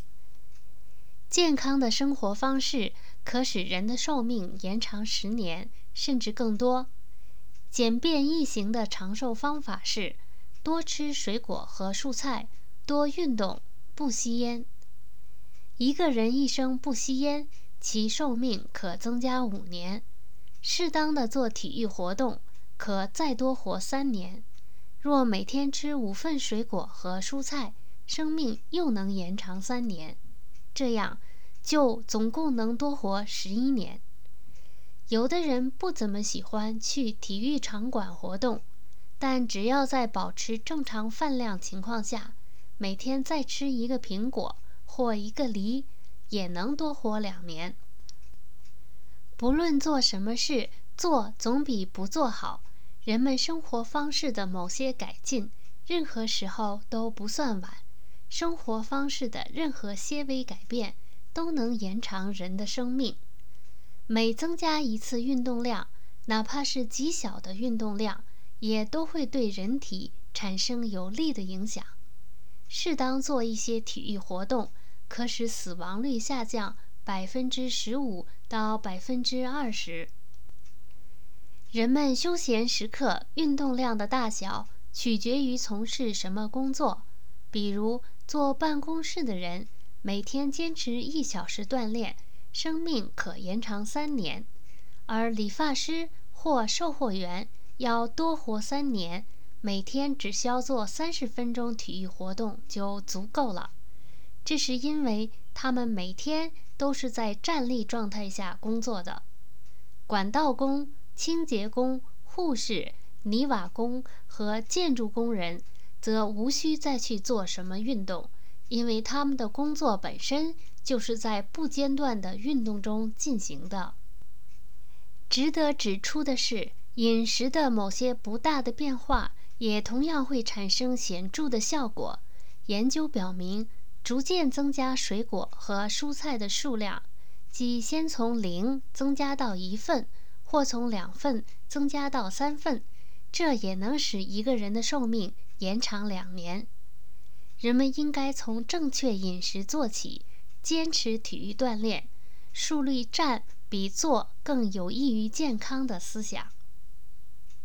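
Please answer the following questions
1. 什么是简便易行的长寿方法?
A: 多吃水果和蔬菜,多运动,不吸烟

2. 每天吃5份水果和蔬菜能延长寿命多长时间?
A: 三年

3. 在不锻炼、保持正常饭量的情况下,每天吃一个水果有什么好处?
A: 能多活两年

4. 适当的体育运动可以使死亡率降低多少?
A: 15%到20%

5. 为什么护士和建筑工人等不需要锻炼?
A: 因为他们的工作本身就是在不间断的运动中进行的

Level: 3rd Year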